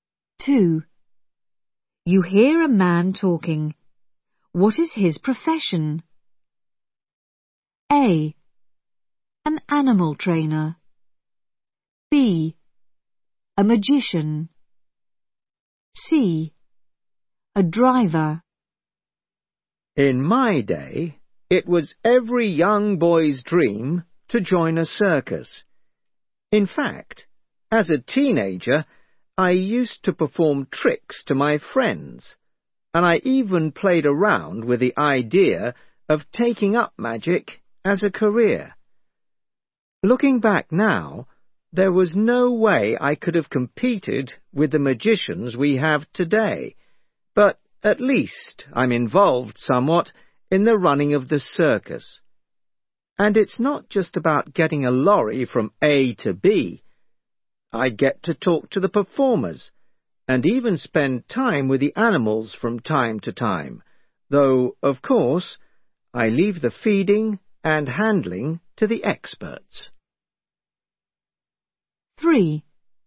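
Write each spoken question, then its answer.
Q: What is his profession?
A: C: A driver.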